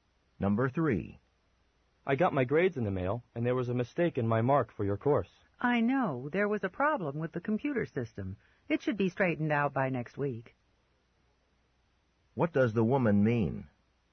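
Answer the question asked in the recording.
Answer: The grade error came from a computer problem and will be fixed by next week.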